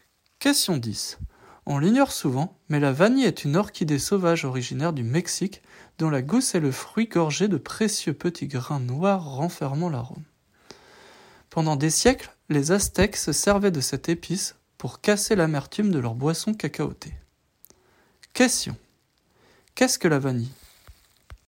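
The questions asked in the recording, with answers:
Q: Qu'est-ce que la vanille ?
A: Une orchidée sauvage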